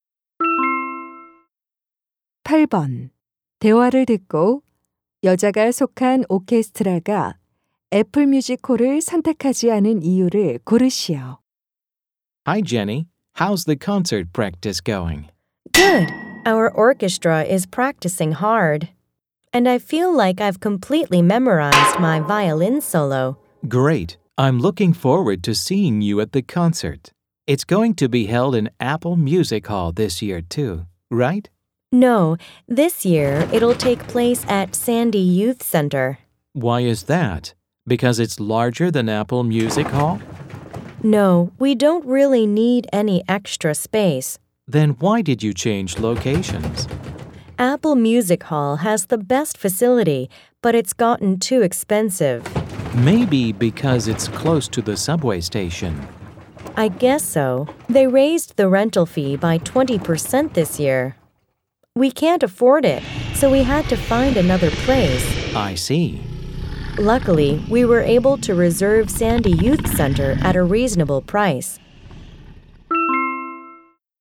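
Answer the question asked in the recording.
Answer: 대관료가 너무 올라서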